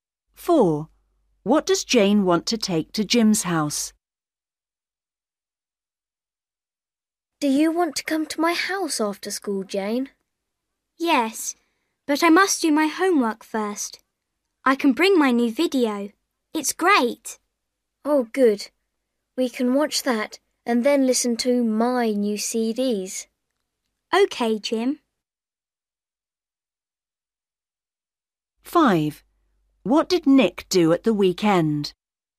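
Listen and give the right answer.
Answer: Her new video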